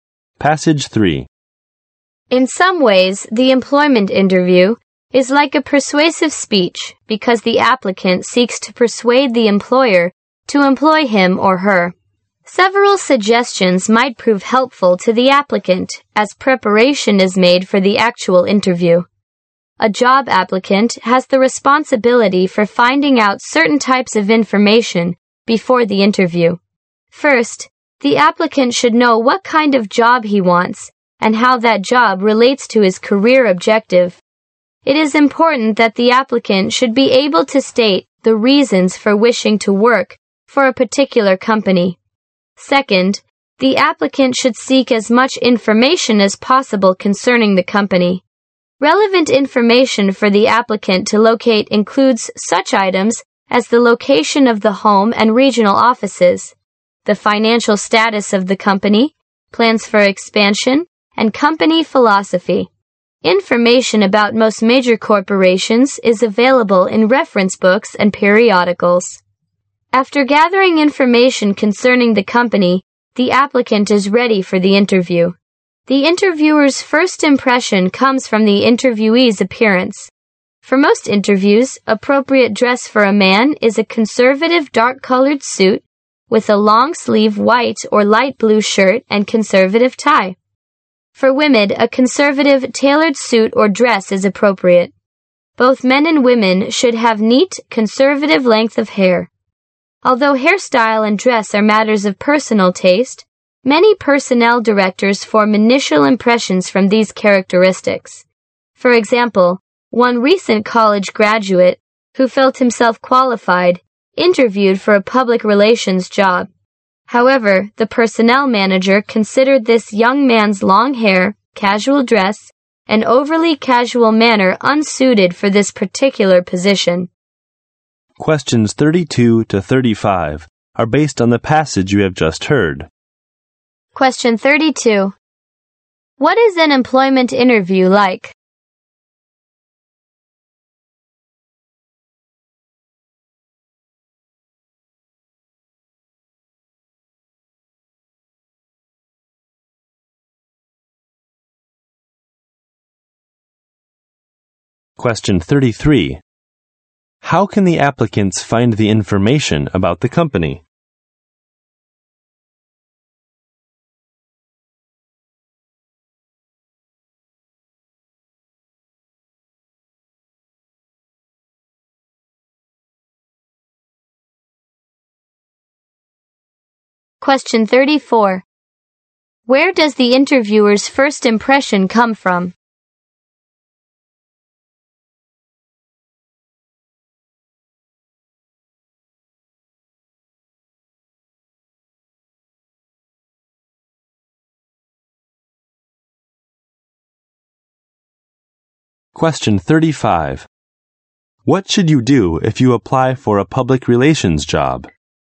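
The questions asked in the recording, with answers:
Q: What is an employment interview like?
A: A persuasive speech.

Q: How can the applicants find the information about the company?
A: From reference books and periodicals.

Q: Where does the interviewer's first impression come from?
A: The interviewee's appearance.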